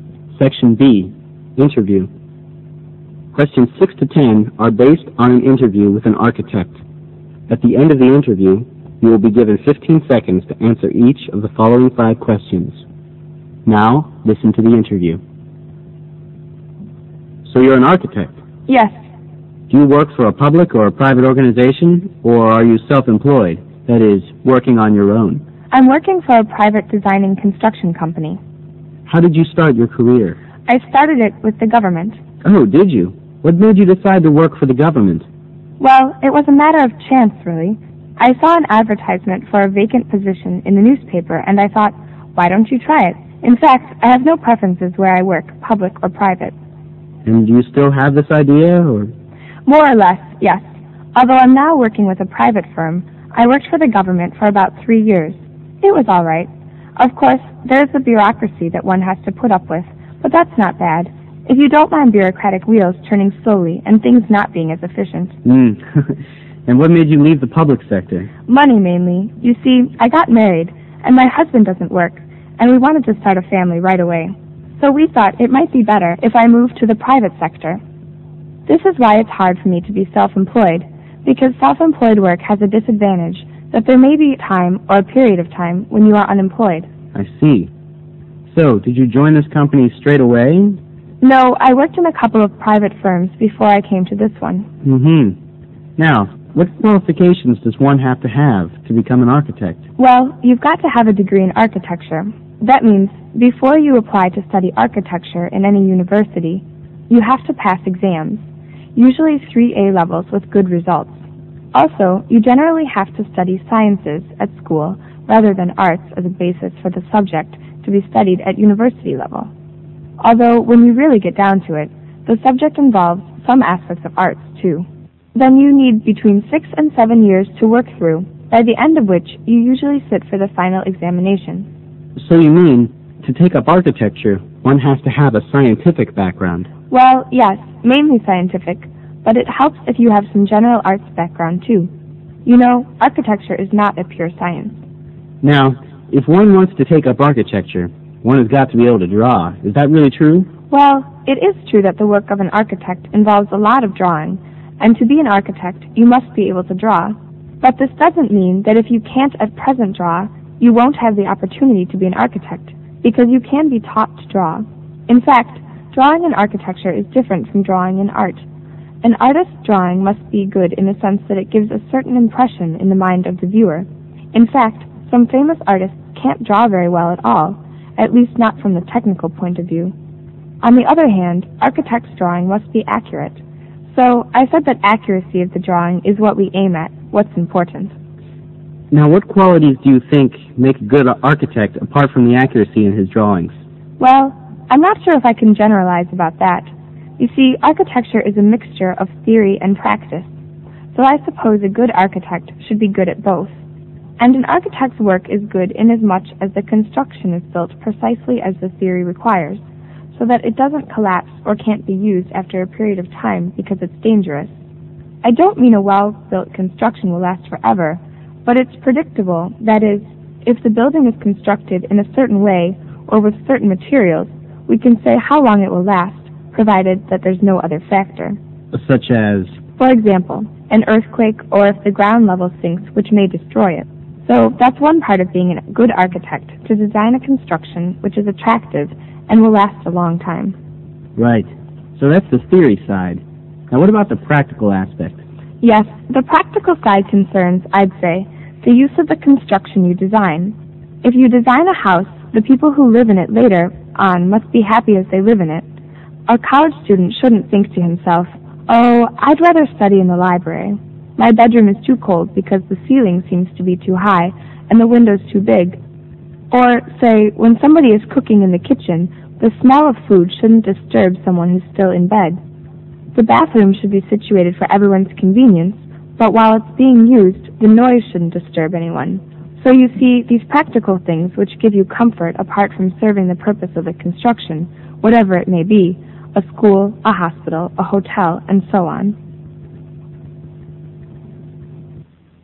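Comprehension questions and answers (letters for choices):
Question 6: The interviewee's first job was with .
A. a newspaper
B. the government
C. a construction firm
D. a private company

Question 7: The interviewee is not self-employed mainly because .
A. his wife likes him to work for a firm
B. he prefers working for the government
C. self-employed work is very demanding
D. self-employed work is sometimes insecure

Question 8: To study architecture in a university one must .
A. be interested in arts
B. study pure science first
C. get good exam results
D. be good at drawing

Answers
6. B
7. D
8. C

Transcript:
Interviewee: Yes.
Interviewer: Do you work for a public or private organization, or are you self-employed, that is, working on your own?
Interviewee: I'm working for a private design and construction company.
Interviewer: How did you start your career?
Interviewee: I started it with the government.
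Interviewer: Oh, did you? What made you decide to work for the government?
Interviewee: Well, it was a matter of chance really. I saw an advertisement for a vacant position in a newspaper, and I thought "Why don't you try it?" In fact, I have no preferences to where I work, public or private.
Interviewer; And do you still have this idea, or ...
Interviewee: More or less. Yes. Although I'm now working for a private firm. I worked for the government for about three years. It was all right. Of course, there is the bureaucracy one has to put up with, but that's not that bad, if you don't mind bureaucratic wheels turning slowly, and things not being as efficient.
Interviewer: Ah-ah. And what made you leave the public sector?
Interviewee: Money mainly. You see, I got married, and my wife doesn't work, and we wanted to start a family right away. So we thought it might be better if I moved to the private sector. 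This is why it's hard for me to be self-employed because self-employed work has the disadvantage that there may be time, or a period of time when you are unemployed.
Interviewer: I see, so, did you join this company straight away or ...
Interviewee: No, I worked for ..., in a couple of private firms before I came to this one.
Interviewer: Hmm ... hmm. Now, what qualifications does one have to have to become an architect?
Interviewee: Well, you've got to have a degree in architecture. That means before you apply to study architecture in any university you have to pass exams. Usually 3A levels with good results. Also you generally have to study sciences at school rather than arts ... as the basis for the subject to be studied at university level. Although when you really get down to it, the subject involves some aspects of arts too. Then you need between six and seven years to work through, by the end of which you usually sit for the final examination.
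Interviewer: So, you mean to take up architecture, one has to have a scientific background?
Interviewee: Well, yes, mainly scientific, but it helps if you have some general arts background too. You know, architecture is not a pure science.
Interviewer: Now, if one wants to take up architecture, one has got to be able to draw? Is that really true?
Interviewee: Well, it is true that the work of an architect involves a lot of drawing, and to be an architect you must be able to draw. But this doesn't mean that if you can't at present draw, you won't have the opportunity to be an architect, because you can be taught to draw. In fact, drawing in architecture is different from drawing in art. An artist's drawing must be good in a sense that it gives a certain impression in the mind of the viewer, in fact, some famous artists can't draw very well at all, at least not from the technical point of view. 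On the other hand, architect's drawing must be accurate. So, I'd say that accuracy of the drawings is what we aim at, what's important.
Interviewer; Now what qualities do you think make a good architect, apart from the accuracy in his drawings?
Interviewee: Well, I'm not sure if I can generalize about that. You see architecture is a mixture of theory and practice. So I suppose a good architect should be good at both. An architect's work is good in as much as the construction is built precisely as the theory requires, so that it doesn't collapse or can't be used after a period of time because it's dangerous. I don't mean a well-built construction will last forever, but it's predictable that if the building is constructed in a certain way, or with certain materials, we can say how long it will last, provided there's no other factor.
Interviewer: Such as?
Interviewee; Er, for example, an earthquake or if the ground level sinks which may destroy it, so that's one part of being a good architect — to design a construction which is attractive and will last a long time.
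Interviewer: Right. So that's the theory side. Now, what about the practical aspect?
Interviewee: Yes, the practical side concerns, I'd say, the use of the construction you design. If you design a house, the people who live in later on, must be happy as living in it. Er, a college student shouldn't think to himself. Oh, I'd rather be study, I'd rather study in the library. My bedroom is too cold because the ceiling seems to be too high, and the windows too big. Or say, when somebody is cooking in the kitchen, the smell of the food shouldn't disturb somebody who's still in bed. The bathroom should be situated for everyone's convenience, but while it's being used, the noise shouldn't disturb anyone. So you see these practical things which give you comfort apart from serving the purpose of the construction whatever it may be — a school, a hospital, a hotel and so on ...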